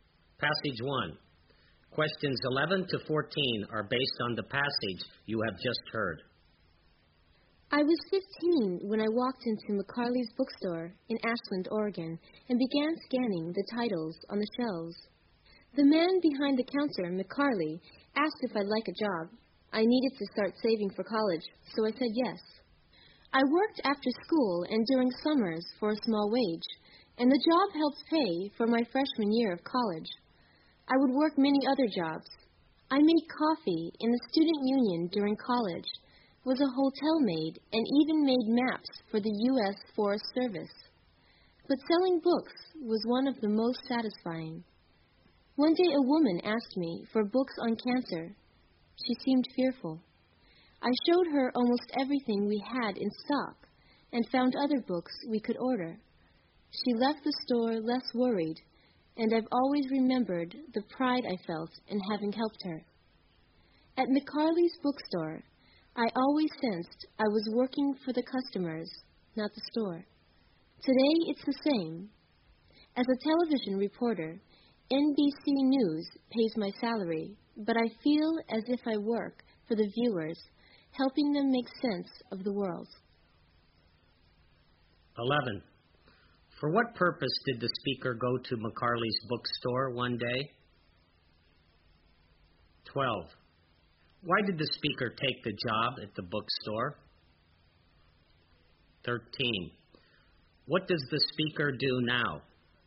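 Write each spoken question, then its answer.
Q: Why did the speaker take the job at the bookstore?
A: To save money for college

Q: What does the speaker do now?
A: She is a television reporter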